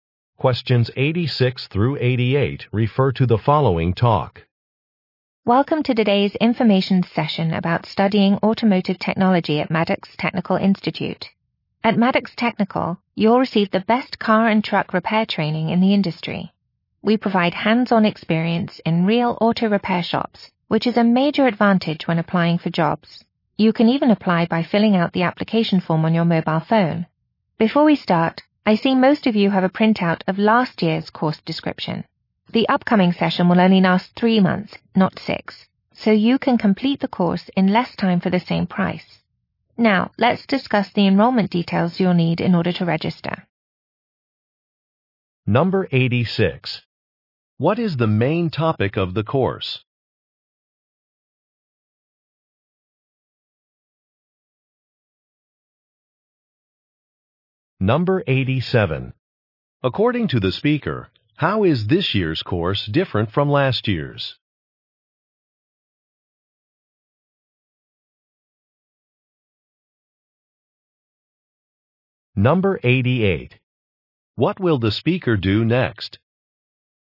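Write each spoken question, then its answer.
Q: What is the main topic of the course?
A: Car and truck repair

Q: According to the speaker, how is this year's course different from last year's?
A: It is shorter, 3 months instead of 6

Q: What will the speaker do next?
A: Discuss enrollment details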